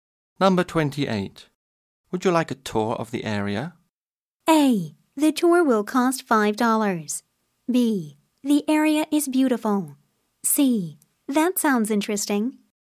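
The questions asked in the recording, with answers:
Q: Would you like a tour of the area?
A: C: That sounds interesting.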